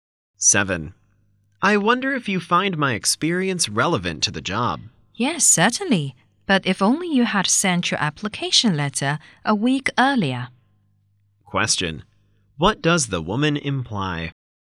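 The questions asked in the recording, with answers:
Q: What does the woman imply?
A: The man applied too late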